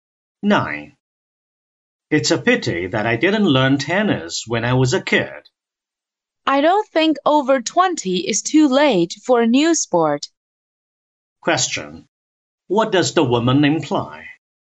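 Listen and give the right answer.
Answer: It's not too late for the man to learn tennis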